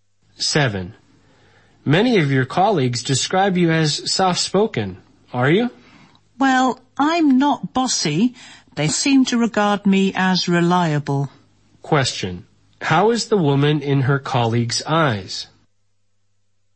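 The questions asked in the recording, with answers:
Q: How is the woman in her colleagues' eyes?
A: Reliable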